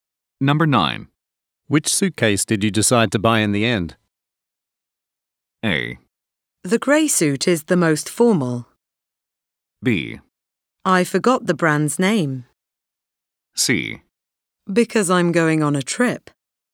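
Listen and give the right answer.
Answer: B: I forgot the brand's name.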